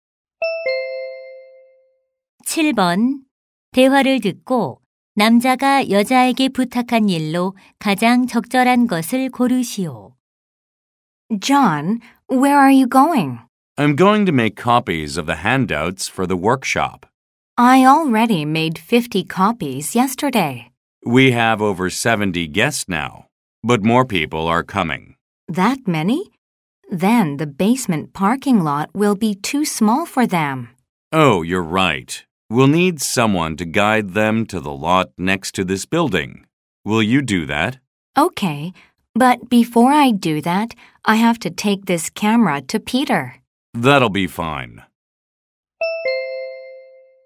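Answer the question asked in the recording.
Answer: 손님들을 옆 건물 주차장으로 안내하기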